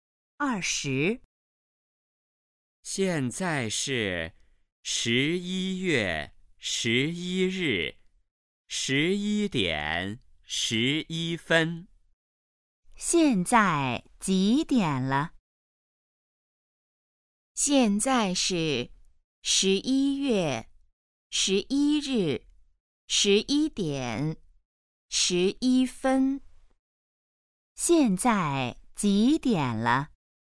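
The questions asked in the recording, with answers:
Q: 现在几点了?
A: 11:11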